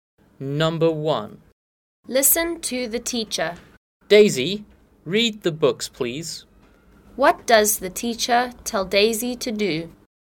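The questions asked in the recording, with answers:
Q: What does the teacher tell Daisy to do?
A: Read the books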